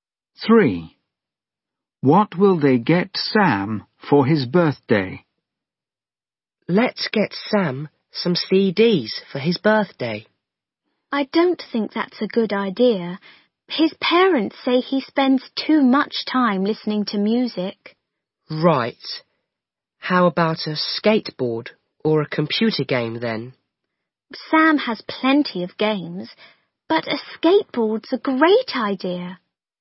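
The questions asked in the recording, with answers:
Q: What will they get Sam for his birthday?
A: a skateboard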